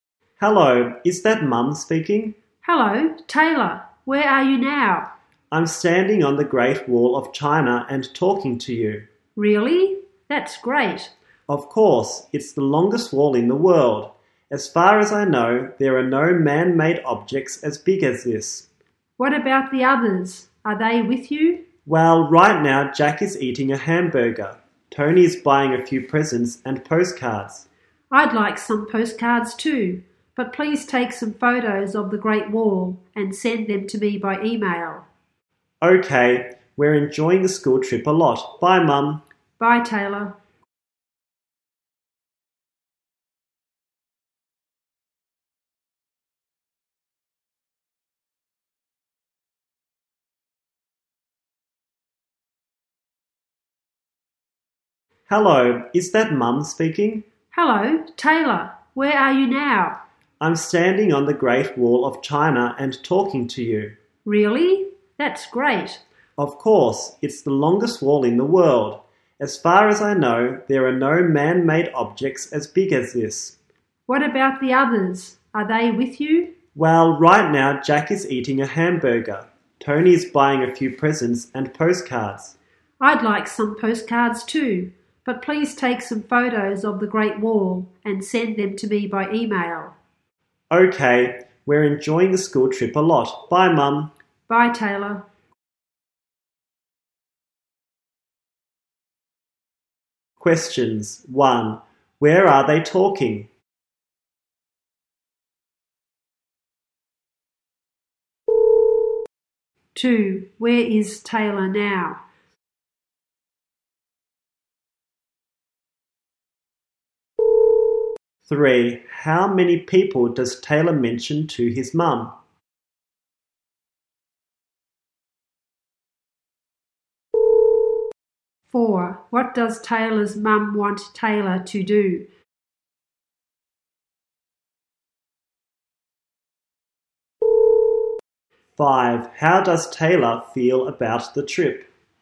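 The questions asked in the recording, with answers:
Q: Where is Taylor now?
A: On the Great Wall of China

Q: How many people does Taylor mention to his mum?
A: Two

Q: What does Taylor's mum want Taylor to do?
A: Take some photos of the Great Wall and email them to her

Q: How does Taylor feel about the trip?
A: He enjoys it a lot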